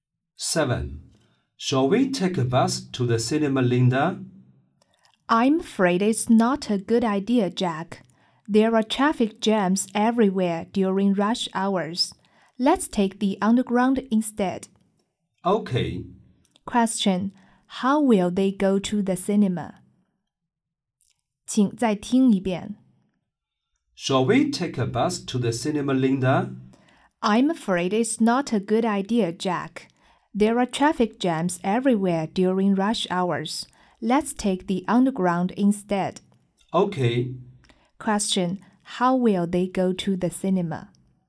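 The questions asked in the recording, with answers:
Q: Question, how will they go to the cinema?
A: By underground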